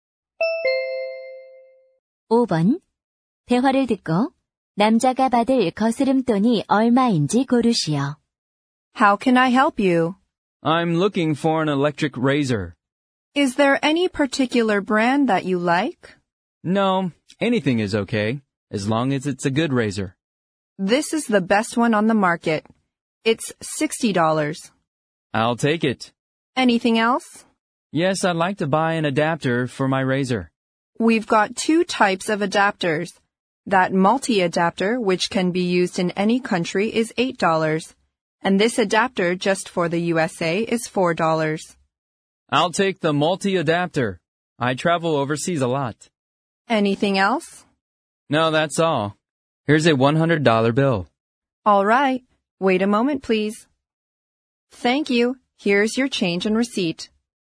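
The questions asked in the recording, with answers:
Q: 대화를 듣고 남자가 받을 거스름돈이 얼마인지 고르시오.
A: 32달러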